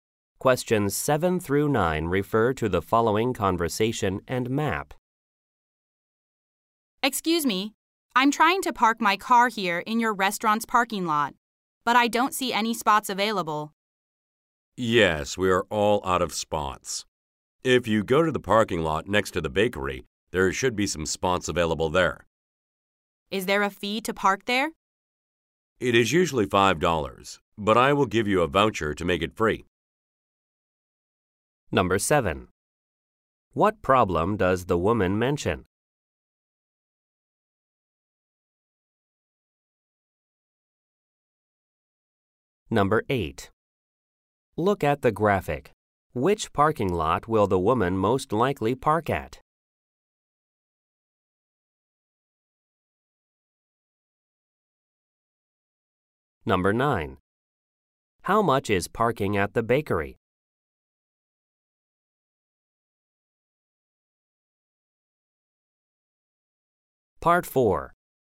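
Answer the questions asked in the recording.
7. There are no parking spots available
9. Usually $5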